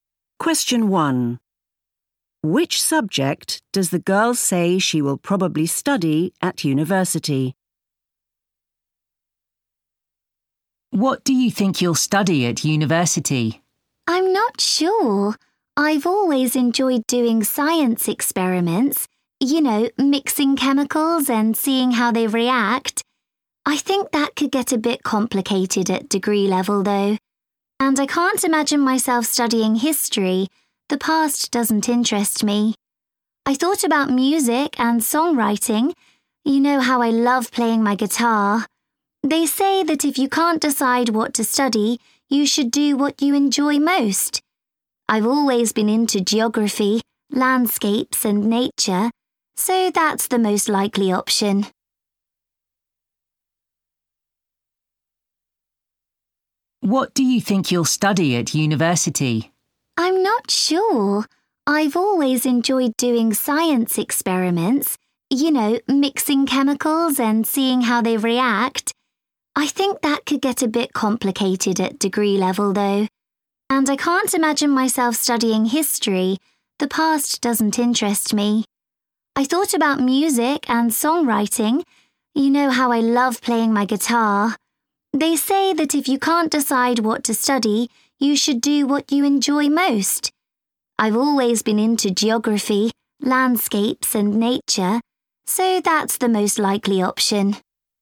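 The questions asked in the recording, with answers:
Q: Which subject does the girl say she will probably study at university?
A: Geography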